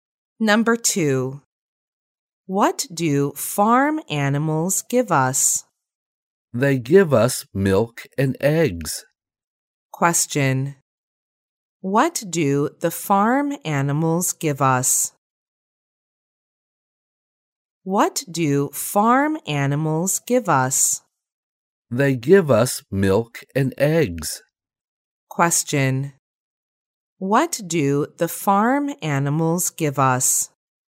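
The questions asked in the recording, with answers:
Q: What do the farm animals give us?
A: Milk and eggs.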